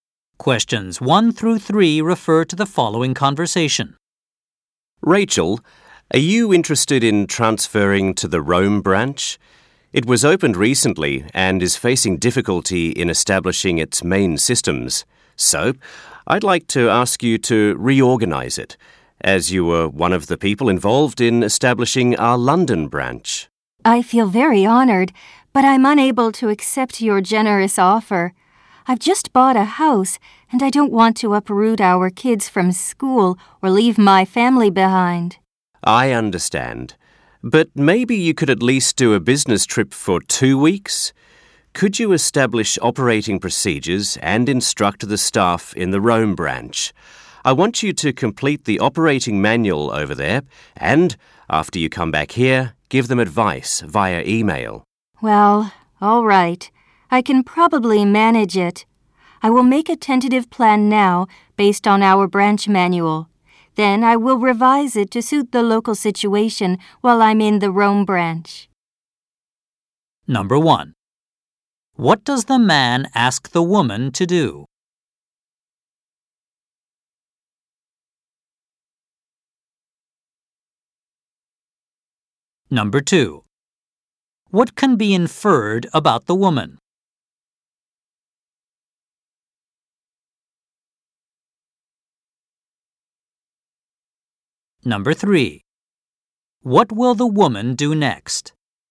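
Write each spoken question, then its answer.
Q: What does the man ask the woman to do?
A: Go on a two-week business trip to the Rome branch to set up operating procedures and train staff

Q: What will the woman do next?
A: Make a tentative plan based on the branch manual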